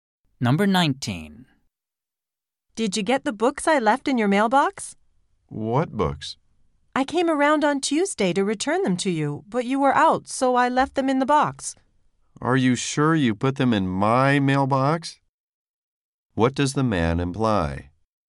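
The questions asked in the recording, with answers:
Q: What does the man imply?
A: He doubts she put the books in his mailbox.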